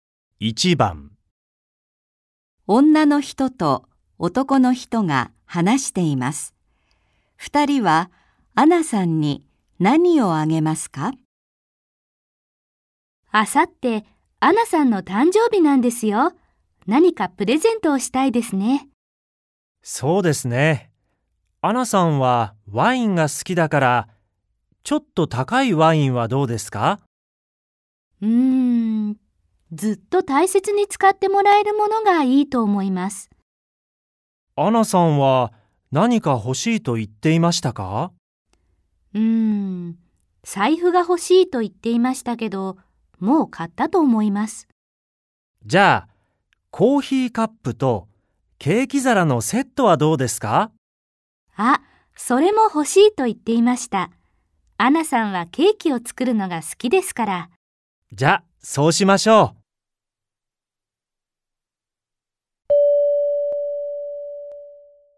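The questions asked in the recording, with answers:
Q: 二人はアナさんに何をあげますか?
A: コーヒーカップとケーキ皿のセット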